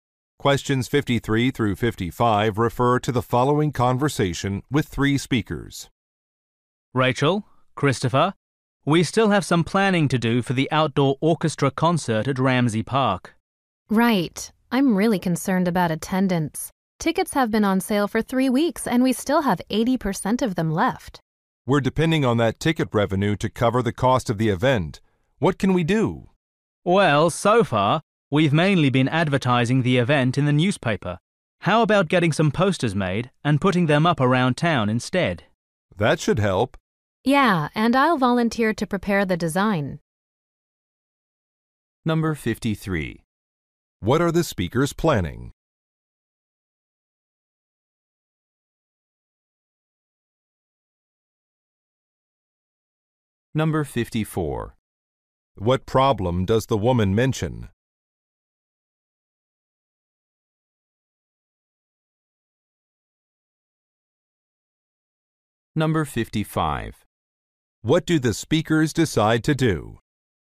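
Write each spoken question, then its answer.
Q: What are the speakers planning?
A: An outdoor orchestra concert

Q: What problem does the woman mention?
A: Ticket sales are low

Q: What do the speakers decide to do?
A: Make posters and put them up around town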